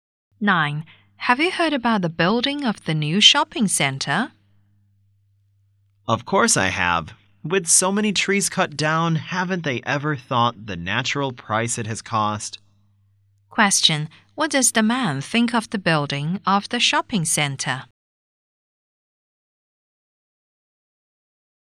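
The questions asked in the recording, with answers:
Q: Question. What does the man think of the building of the shopping center?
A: He disapproves because it harms the environment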